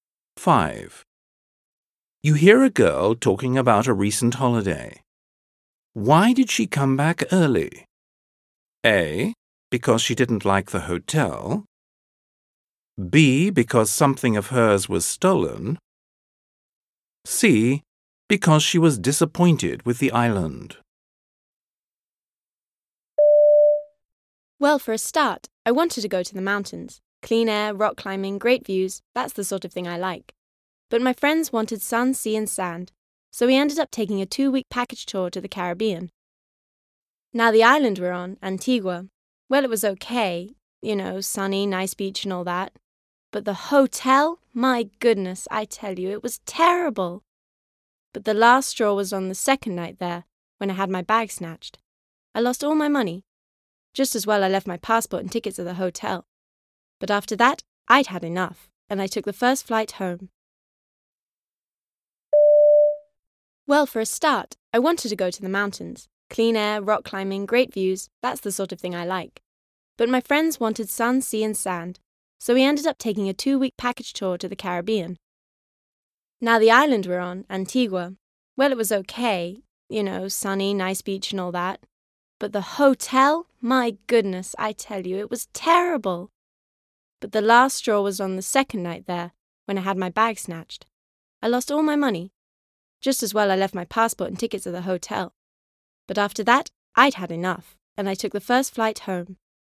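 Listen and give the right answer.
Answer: B: Because something of hers was stolen.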